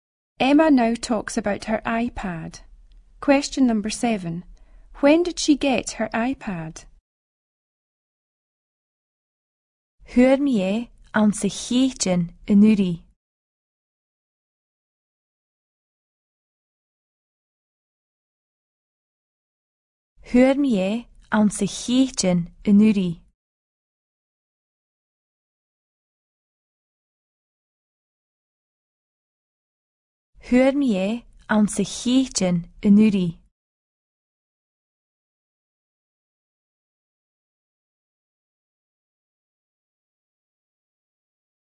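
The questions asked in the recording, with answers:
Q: When did she get her iPad?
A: In May last year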